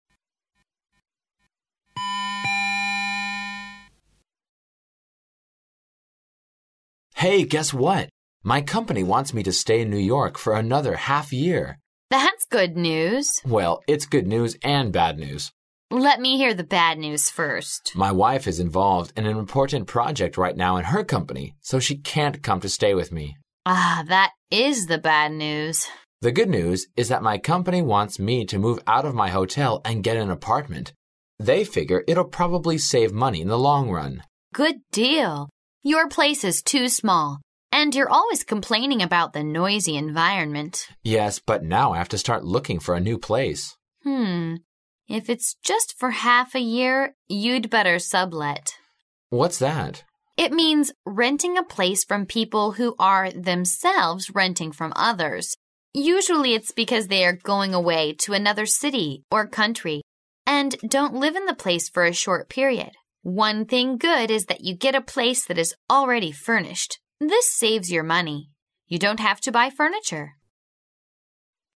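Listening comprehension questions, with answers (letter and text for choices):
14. What's the problem with the man's place now?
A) It's too expensive.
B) It's in a hotel.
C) His wife can't come here to stay with him.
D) It's not big enough and noisy.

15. What does "sublet" mean?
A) It means renting a place from other people.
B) It means renting a place from people who rents the place.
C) It means renting a place for a short period.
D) It means renting a place from people who is away to other places.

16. Why does the woman advise the man the sublet?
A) Because it's convenient.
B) Because the man doesn't need to spend money on furniture.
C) Because the company can save money in the long run.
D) Because the company doesn't have to buy furniture for the man.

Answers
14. D) It's not big enough and noisy.
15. B) It means renting a place from people who rents the place.
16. B) Because the man doesn't need to spend money on furniture.

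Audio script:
A.His company wants him to stay in New York for another half year.
M: Well, it's good news and bad news. W: Let me hear the bad news first. M: My wife is involved in an important project right now in her company, so she can't come to stay with me. W: Ah, that is the bad news. M: The good news is that my company wants me to move out of my hotel and get an apartment. They figure it'll probably save money in the long run. W: Good deal. Your place is too small and you're always complaining about the noisy environment. M: Yes, but now I have to start looking for a new place. If it's just for half a year, you'd better sublet. M: What's that? W: It means renting a place from people who are themselves renting from others. Usually it's because they are going away to another city or country and don't live in the place for a short period. One thing good is that you get a place that is already furnished. 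This saves your money. You don't have to buy furniture.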